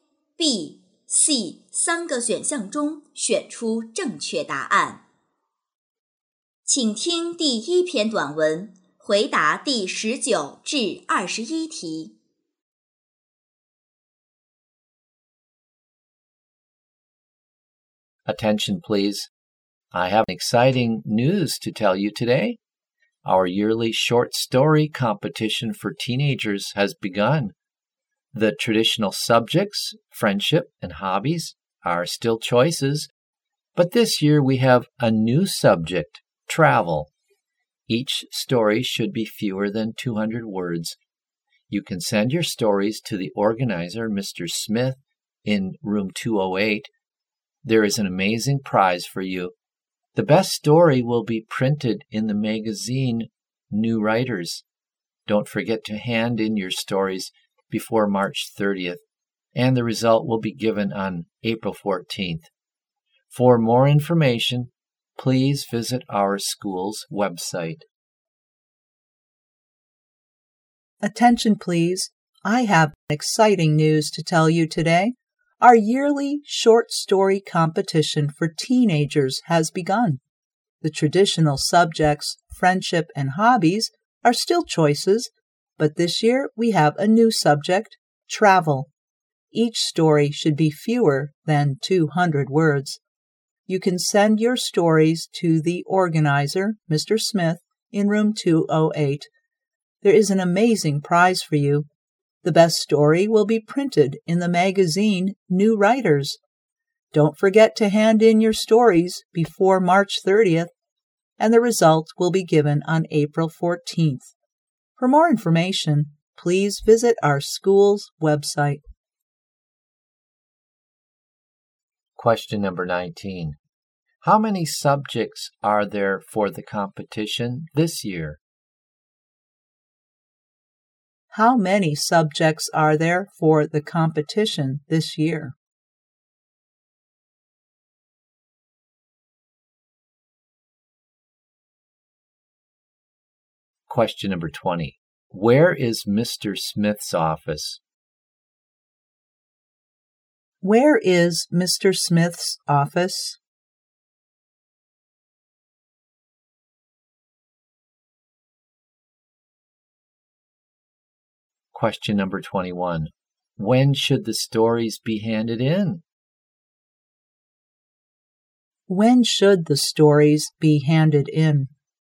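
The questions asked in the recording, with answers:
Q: How many subjects are there for the competition this year?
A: Three

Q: Where is Mr. Smith's office?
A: Room 208

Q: When should the stories be handed in?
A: Before March 30th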